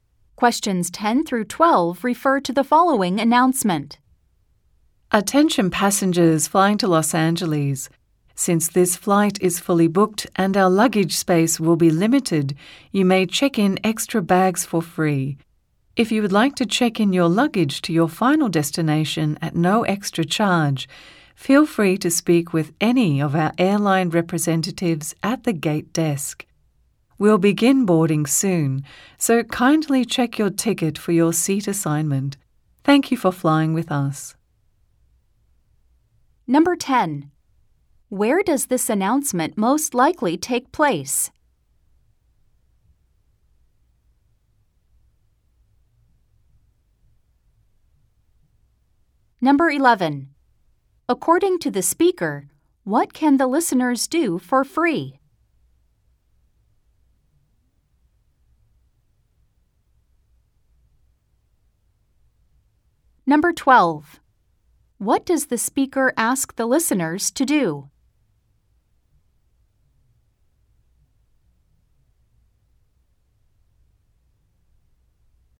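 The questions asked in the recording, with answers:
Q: Where does this announcement most likely take place?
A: At an airport gate

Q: According to the speaker, what can the listeners do for free?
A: Check in extra bags

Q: What does the speaker ask the listeners to do?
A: Check their ticket for their seat assignment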